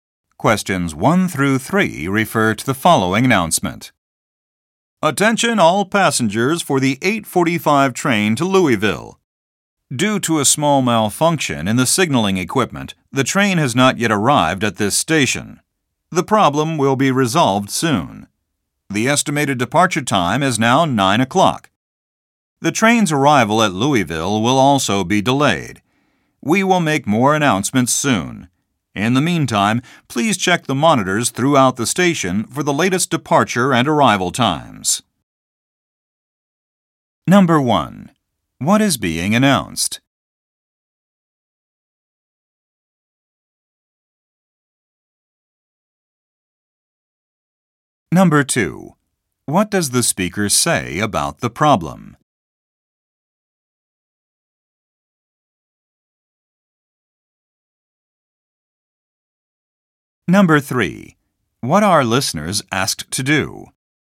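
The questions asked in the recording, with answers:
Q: What is being announced?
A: A train delay

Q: What does the speaker say about the problem?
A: It will be resolved soon

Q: What are listeners asked to do?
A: Check the monitors for the latest times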